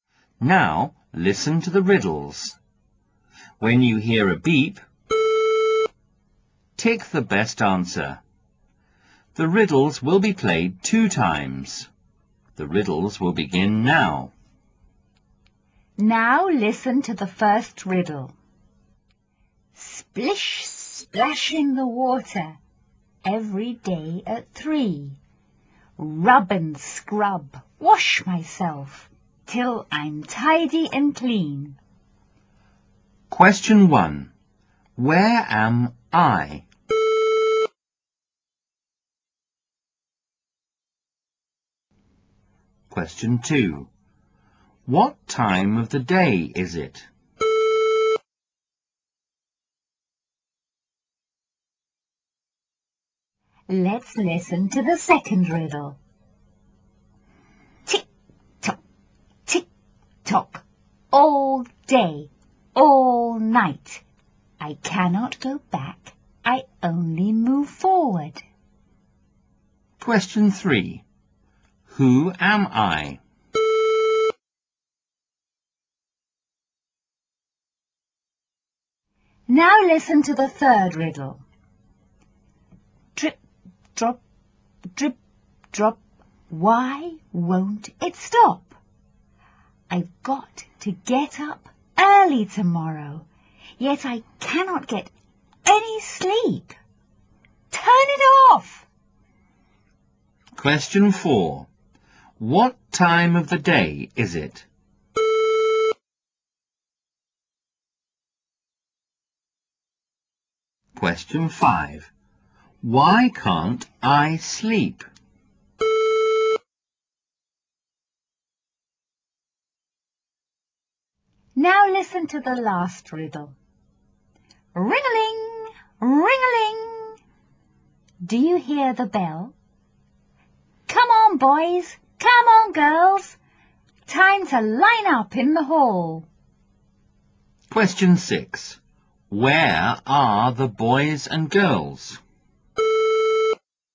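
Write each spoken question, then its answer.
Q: Who am I?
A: A clock.

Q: What time of the day is it?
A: Night.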